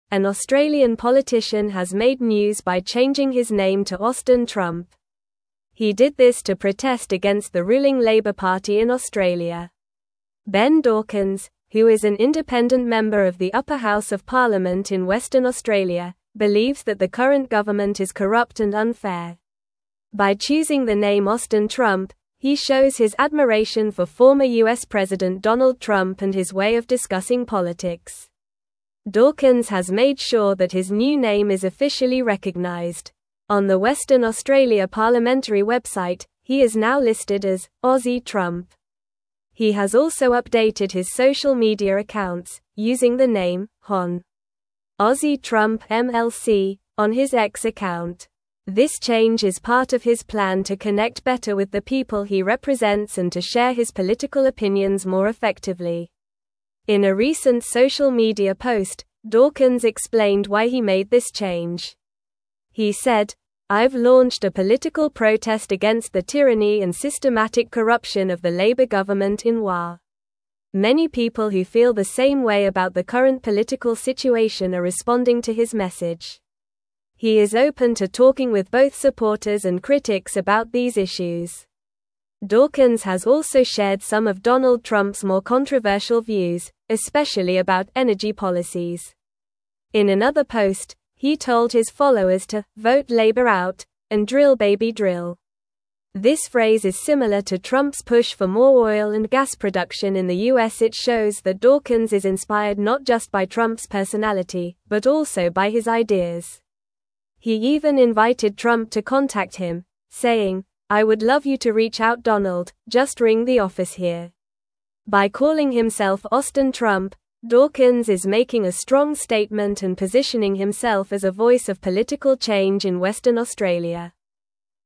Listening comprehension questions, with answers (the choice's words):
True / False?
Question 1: Dawkins uses the name "Hon. Aussie Trump MLC" on his social media accounts.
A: True

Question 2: Dawkins has denounced some of Donald Trump's controversial views, especially regarding energy policies.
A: False

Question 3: He invited Donald Trump to contact him directly, expressing his disdain for him.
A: False

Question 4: An Australian politician changed his name to Austin Obama as a form of protest.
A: False

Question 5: Dawkins believes the current Labor government in Australia is just and fair.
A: False

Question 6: Ben Dawkins is an independent member of the upper house of parliament in Western Australia.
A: True

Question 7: He officially updated his name on the Western Australia parliamentary website to "Aussie Trump."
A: True

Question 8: He launched this name change to connect better with the people he represents.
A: True

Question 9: An Australian (1)______ has made news by changing his name to Austin (2)______.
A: politician

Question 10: An Australian (1)______ has made news by changing his name to Austin (2)______.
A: Trump

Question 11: He did this to protest against the ruling (3)______ Party in Australia.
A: Labor

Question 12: Ben Dawkins, who is an independent member of the upper (4)______ of parliament in Western Australia,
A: house

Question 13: On the Western (5)______ parliamentary (6)______, he is now listed as "(7)______ Trump."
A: Australia

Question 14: On the Western (5)______ parliamentary (6)______, he is now listed as "(7)______ Trump."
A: website

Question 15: On the Western (5)______ parliamentary (6)______, he is now listed as "(7)______ Trump."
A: Aussie

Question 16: This change is part of his plan to (8)______ better with the people he represents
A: connect

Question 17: I've launched a political protest against the tyranny and systematic (9)______ of the Labor government in WA.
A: corruption

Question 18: Dawkins has also shared some of Donald Trump's more controversial (10)______, especially about (11)______ policies.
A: views

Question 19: Dawkins has also shared some of Donald Trump's more controversial (10)______, especially about (11)______ policies.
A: energy

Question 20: In another post, he told his (12)______ to "Vote Labor Out! & Drill Baby Drill!"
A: followers

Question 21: This phrase is (13)______ to Trump's push for more oil and gas production in the U.S.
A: similar

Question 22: "I would love you to (14)______ out Donald, just ring the office here."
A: reach

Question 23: By calling himself Austin Trump, Dawkins is (15)______ a (16)______ statement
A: making

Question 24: By calling himself Austin Trump, Dawkins is (15)______ a (16)______ statement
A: strong

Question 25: What is the name that the Australian politician changed to?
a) Ben Dawkins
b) Donald Trump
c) Labor Party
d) Austin Trump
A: Austin Trump

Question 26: What is Ben Dawkins' political affiliation?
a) Labor Party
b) Liberal Party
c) Green Party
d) Independent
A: Independent

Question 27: What does Dawkins believe about the current government in Australia?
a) It is corrupt and unfair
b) It is effective and just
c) It is too lenient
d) It is very popular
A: It is corrupt and unfair

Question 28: How is Dawkins officially recognized on the Western Australia parliamentary website?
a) Ben Dawkins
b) Austin Trump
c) Aussie Trump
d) Hon. Ben Dawkins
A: Aussie Trump

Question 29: What phrase did Dawkins use to encourage his followers regarding energy policies?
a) Save the Environment!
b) Vote Labor Out! & Drill Baby Drill!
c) Change is Coming!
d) Support Renewable Energy!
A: Vote Labor Out! & Drill Baby Drill!

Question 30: Who does Dawkins express admiration for through his name change?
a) Joe Biden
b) Barack Obama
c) Donald Trump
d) Scott Morrison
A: Donald Trump

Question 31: What does Dawkins aim to achieve by changing his name?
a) Connect better with the people he represents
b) Run for president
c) Gain more social media followers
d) Criticize the U.S. government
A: Connect better with the people he represents

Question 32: How did Dawkins invite Donald Trump to contact him?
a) By sending an email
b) By saying to ring the office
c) By posting on social media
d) By writing a letter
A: By saying to ring the office

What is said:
An Australian politician has made news by changing his name to Austin Trump. He did this to protest against the ruling Labor Party in Australia. Ben Dawkins, who is an independent member of the upper house of parliament in Western Australia, believes that the current government is corrupt and unfair. By choosing the name Austin Trump, he shows his admiration for former U.S. President Donald Trump and his way of discussing politics.
Dawkins has made sure that his new name is officially recognized. On the Western Australia parliamentary website, he is now listed as "Aussie Trump." He has also updated his social media accounts, using the name "Hon. Aussie Trump MLC" on his X account. This change is part of his plan to connect better with the people he represents and to share his political opinions more effectively.
In a recent social media post, Dawkins explained why he made this change. He said, "I've launched a political protest against the tyranny and systematic corruption of the Labor government in WA." Many people who feel the same way about the current political situation are responding to his message. He is open to talking with both supporters and critics about these issues.
Dawkins has also shared some of Donald Trump's more controversial views, especially about energy policies. In another post, he told his followers to "Vote Labor Out! & Drill Baby Drill!" This phrase is similar to Trump's push for more oil and gas production in the U.S. It shows that Dawkins is inspired not just by Trump's personality, but also by his ideas. He even invited Trump to contact him, saying, "I would love you to reach out Donald, just ring the office here." By calling himself Austin Trump, Dawkins is making a strong statement and positioning himself as a voice of political change in Western Australia.

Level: Level 3